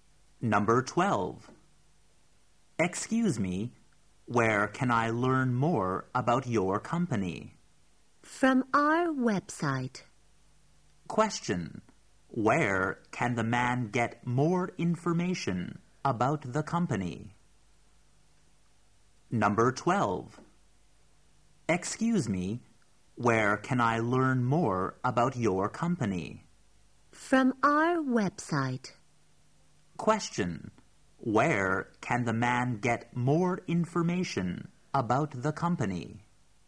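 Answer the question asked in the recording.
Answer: From the company's website.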